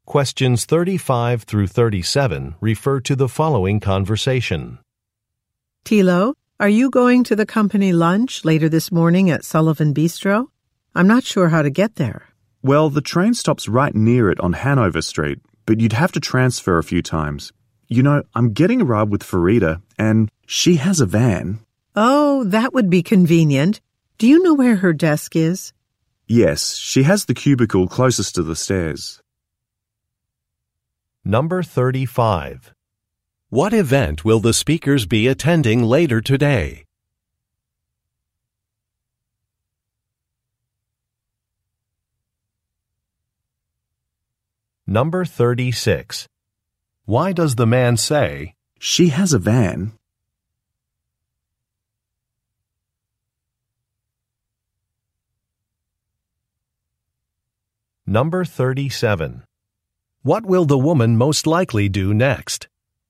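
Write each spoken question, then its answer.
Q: What event will the speakers be attending later today?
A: A company lunch

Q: Why does the man say, "She has a van"?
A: To suggest the woman could also get a ride with Farida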